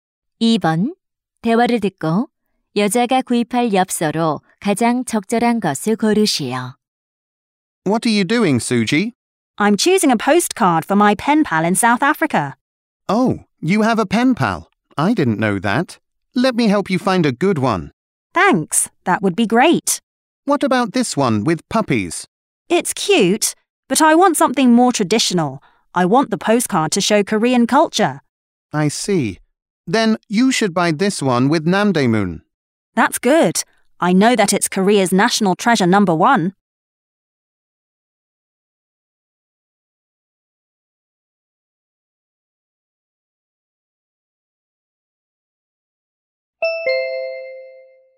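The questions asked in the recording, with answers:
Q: 대화를 듣고 여자가 구입할 엽서로 가장 적절한 것을 고르시오.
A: 남대문이 있는 엽서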